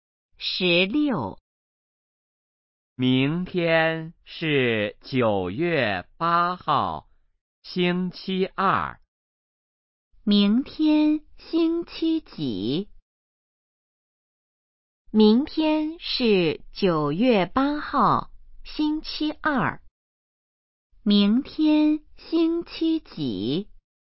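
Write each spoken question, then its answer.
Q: 明天星期几?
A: 星期二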